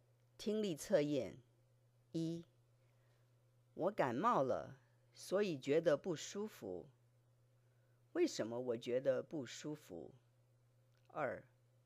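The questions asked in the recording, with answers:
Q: 为什么我觉得不舒服?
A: 因为我感冒了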